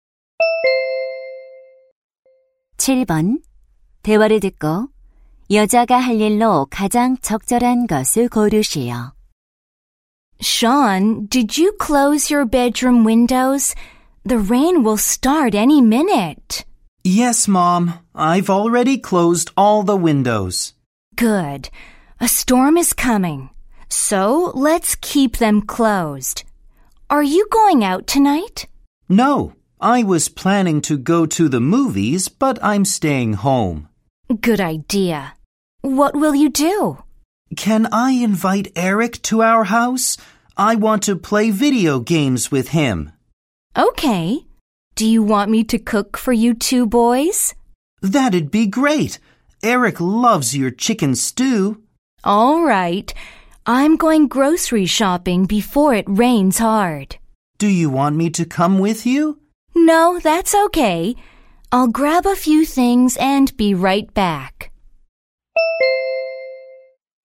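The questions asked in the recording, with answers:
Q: 대화를 듣고 여자가 할 일로 가장 적절한 것을 고르시오.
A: 장보러 가기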